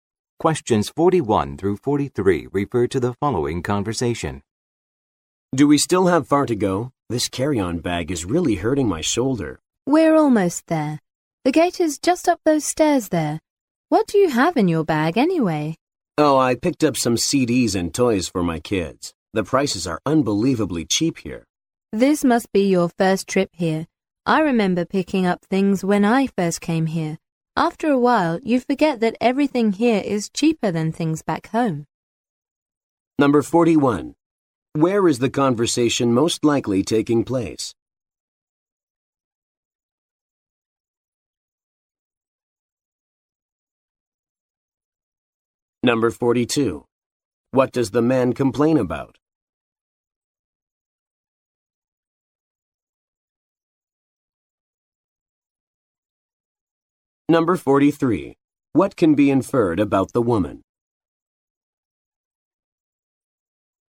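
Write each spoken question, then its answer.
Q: Where is the conversation most likely taking place?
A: At an airport

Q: What does the man complain about?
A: His carry-on bag is hurting his shoulder

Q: What can be inferred about the woman?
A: She has been there before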